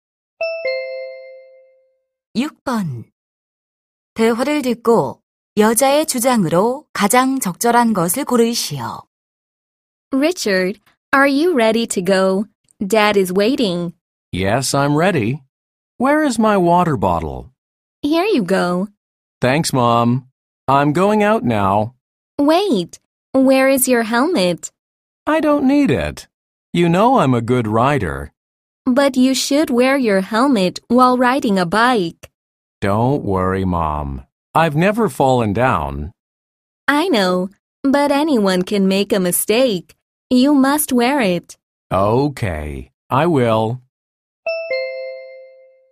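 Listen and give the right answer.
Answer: 자전거를 탈 때 헬멧을 써야 한다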